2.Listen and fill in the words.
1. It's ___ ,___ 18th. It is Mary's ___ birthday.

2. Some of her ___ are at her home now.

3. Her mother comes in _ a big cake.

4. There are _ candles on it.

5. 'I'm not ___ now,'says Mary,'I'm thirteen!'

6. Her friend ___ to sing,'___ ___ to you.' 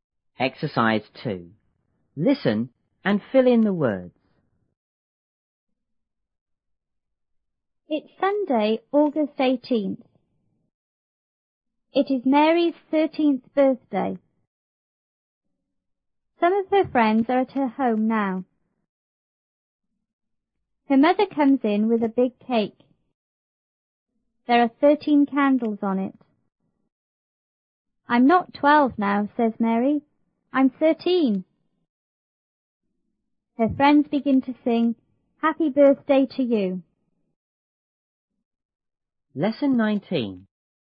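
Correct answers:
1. Sunday, August, 13th
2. friends
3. with
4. 13
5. twelve
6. begin, Happy Birthday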